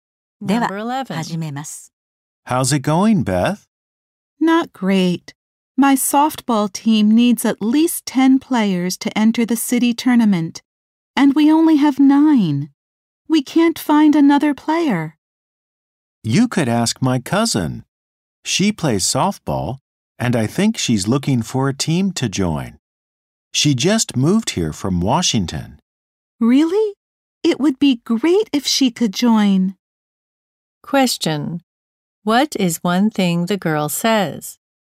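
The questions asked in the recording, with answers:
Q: What is one thing the girl says?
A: Her softball team needs one more player for the city tournament.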